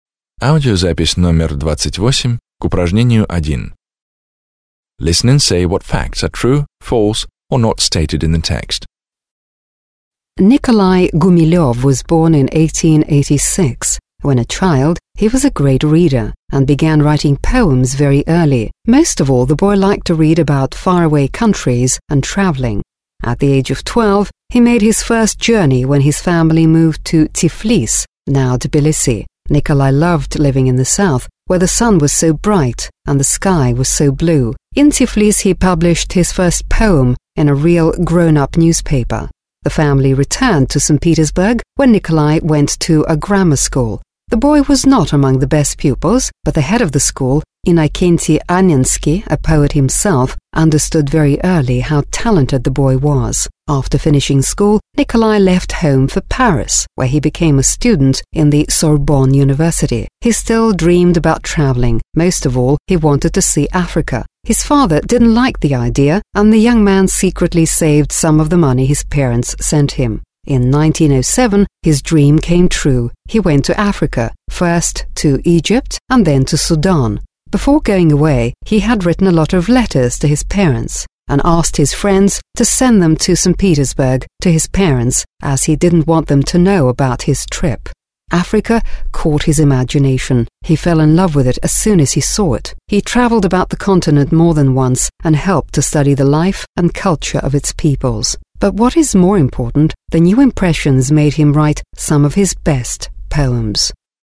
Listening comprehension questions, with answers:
B. Listen, (28), and say which of the following facts are true, false or not stated in the text.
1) In the poet's early years one of his greatest pleasures was books.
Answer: True

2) Nikolai began to think about travelling after he visited Tiflis.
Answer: Not stated

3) Tiflis was the place where Nikolai's poem first came out in print.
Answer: True

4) Nikolai's new school was one of the best in St Petersburg.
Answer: Not stated

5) Innokenty Annensky, the school's Head, was an author.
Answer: True

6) Nikolai's father wanted to send his son to Africa.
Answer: False

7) The poet didn't write to his parents from Africa.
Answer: True

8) The poet did some scientific work in Africa.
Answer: True

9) Gumilyov's poems about his travels soon made him famous.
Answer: Not stated

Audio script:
Nikolai Gumiliov was born in 1886. When a child he was a great reader and he began writing poems very early. Most of all the boy liked to read about far-away countries and travelling.
At the age of 12 he made his first journey when his family moved to Tiflis (now Tbilisi). Nikolai loved living in the south where the sun was so bright and the sky was so blue. In Tiflis he published his first poem in a real grown−up newspaper.
The family returned to St Petersburg where Nikolai went to grammar school. The boy was not among the best pupils but the Head of the school, Innokenty Annensky, a poet himself, understood very early how talented the boy was. After finishing school Nikolai left home for Paris, where he became a student at Sorbonne University. He still dreamed about travelling. Most of all he wanted to see Africa. His father didn't like the idea and the young man secretly saved some of the money his parents sent him. In 1907 his dream came true. He went to Africa: first, Egypt and then to Sudan. Before going away he had written a lot of letters to his parents and asked his friends to send them to St Petersburg to his parents as he didn't want them to know about his trip.
Africa caught his imagination and he fell in love with it as soon as he saw it. He travelled around the continent more than once and helped to study the life and culture of its peoples. More importantly, the new impressions made him write wonderful poems.

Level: 9 класс